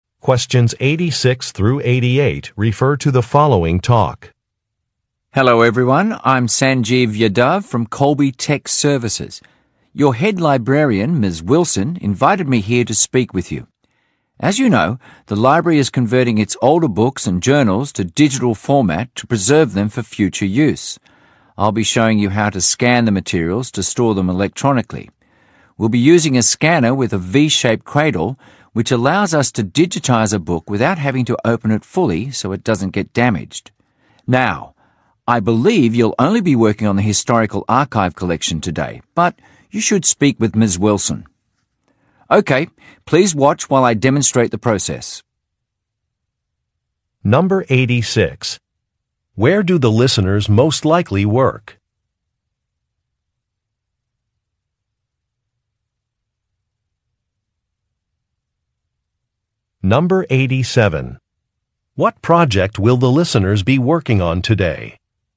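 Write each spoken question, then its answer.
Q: Where do the listeners most likely work?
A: At a library

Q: What project will the listeners be working on today?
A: Scanning the historical archive collection into digital format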